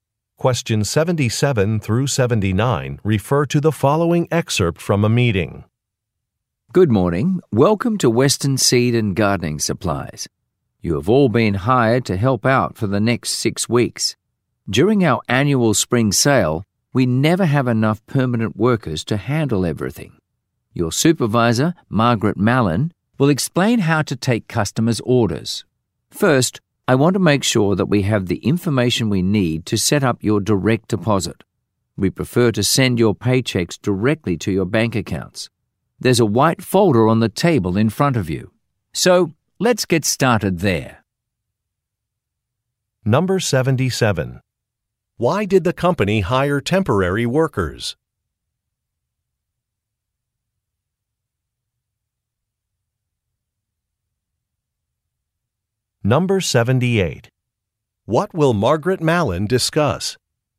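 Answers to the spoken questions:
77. For the annual spring sale
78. How to take customers' orders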